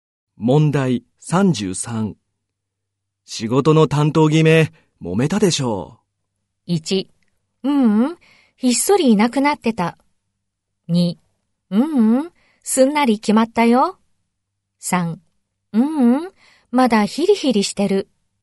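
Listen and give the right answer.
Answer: 2: ううん、すんなり決まったよ。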